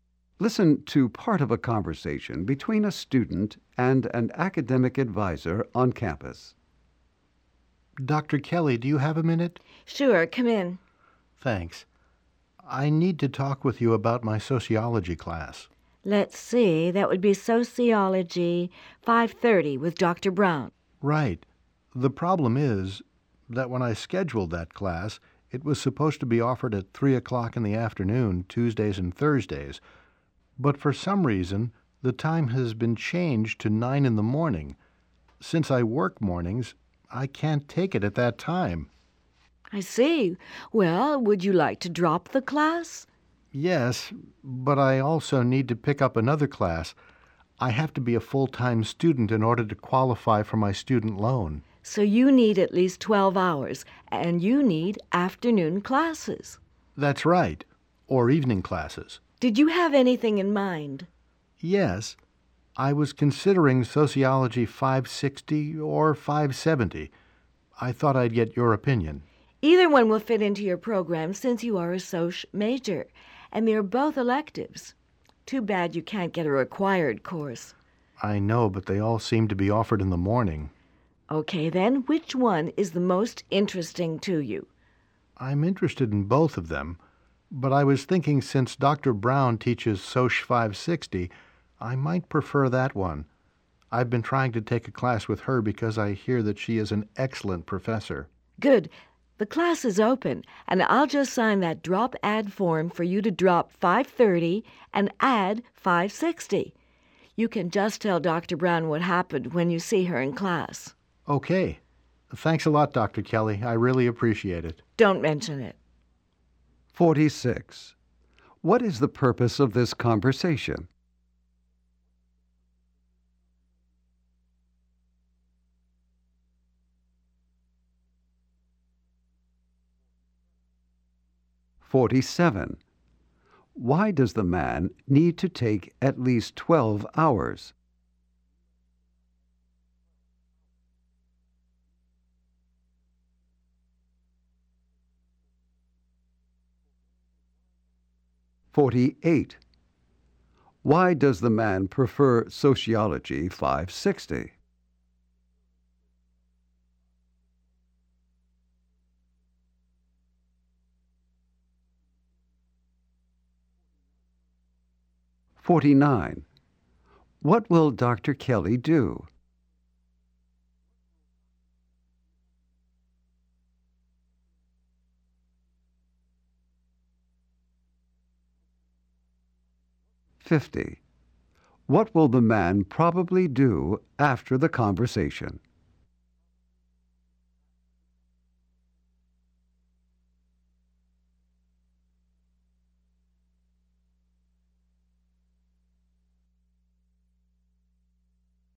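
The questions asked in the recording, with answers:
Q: What is the purpose of this conversation?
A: To drop a sociology class whose time changed and add another.

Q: Why does the man need to take at least 12 hours?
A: To be full-time and qualify for his student loan.

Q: Why does the man prefer sociology 560?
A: Dr. Brown teaches it, and he hears she is excellent.

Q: What will Dr.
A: Sign the drop/add form.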